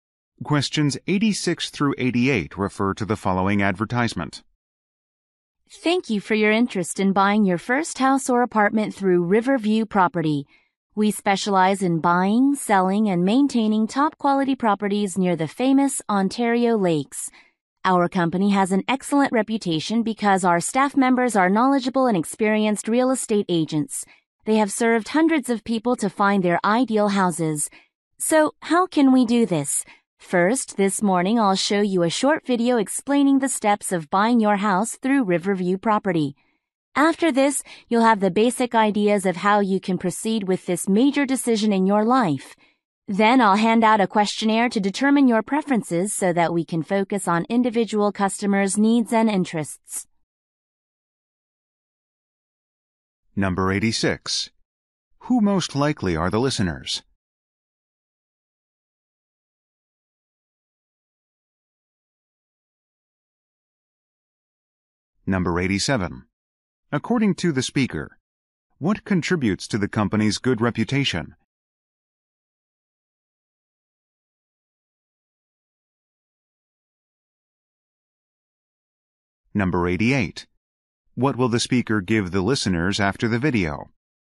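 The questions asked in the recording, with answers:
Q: Who most likely are the listeners?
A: First-time home buyers

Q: According to the speaker, what contributes to the company's good reputation?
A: Knowledgeable and experienced staff

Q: What will the speaker give the listeners after the video?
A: A questionnaire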